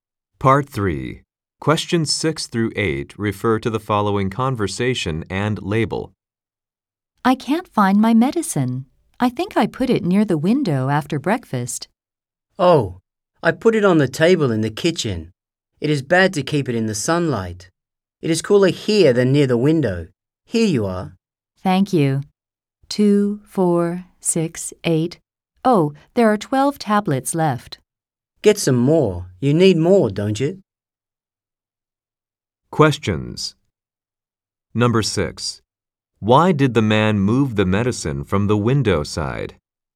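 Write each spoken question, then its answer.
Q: Why did the man move the medicine from the window side?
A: Because it is bad to keep medicine in the sunlight.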